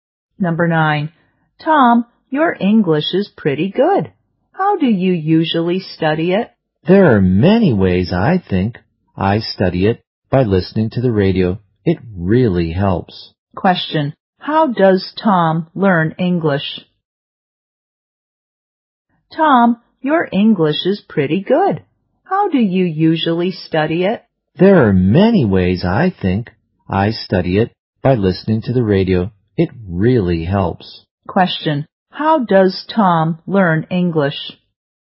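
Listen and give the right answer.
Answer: By listening to the radio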